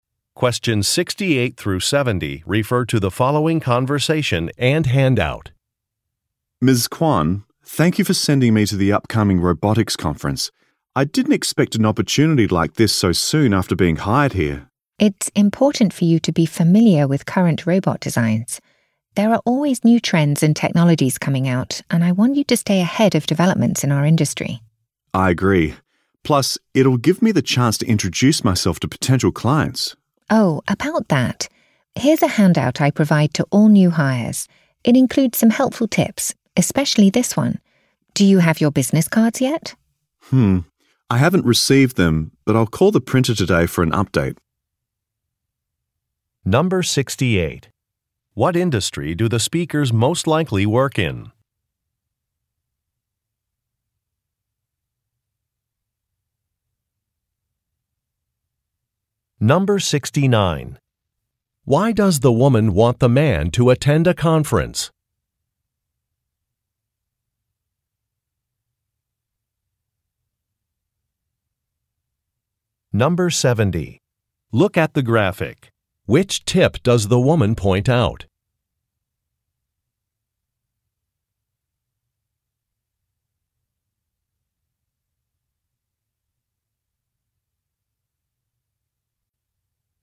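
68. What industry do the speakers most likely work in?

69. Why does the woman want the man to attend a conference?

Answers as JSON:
{"68": "Robotics", "69": "To learn about current designs and new developments in the industry"}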